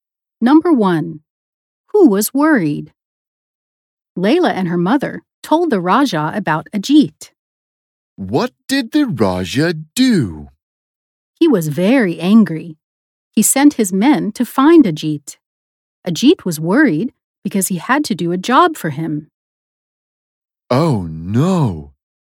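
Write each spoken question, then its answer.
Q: Who was worried?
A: Ajit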